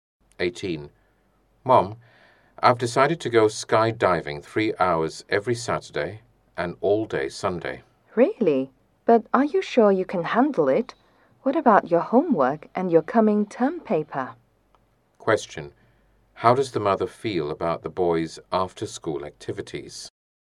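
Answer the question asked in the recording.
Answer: Worried he can't handle it with his homework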